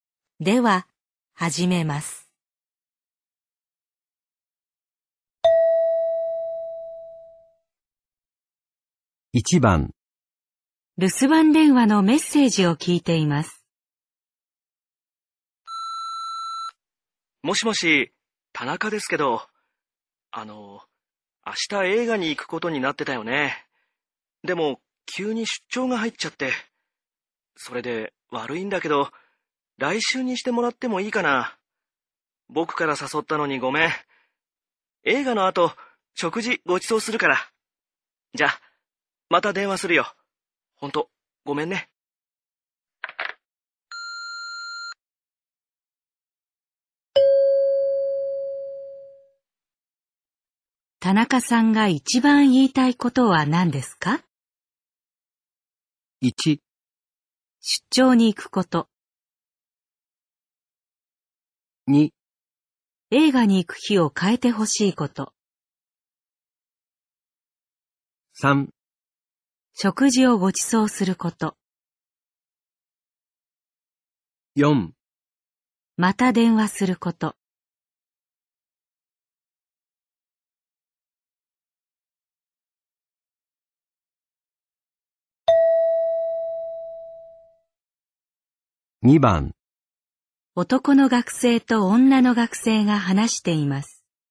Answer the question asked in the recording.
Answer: 2

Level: N3 Listening · Test 15